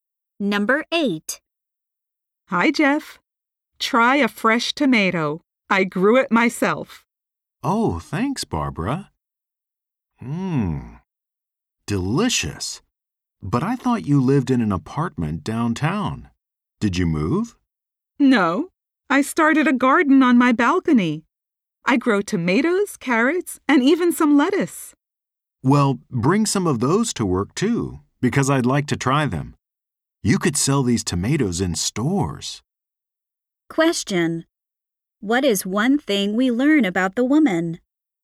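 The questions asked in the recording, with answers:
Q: What is one thing we learn about the woman?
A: She grows vegetables on her apartment balcony.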